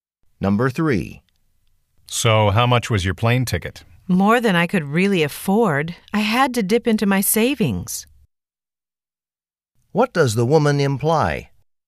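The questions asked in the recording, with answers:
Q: What does the woman imply?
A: The ticket was expensive, so she had to use her savings.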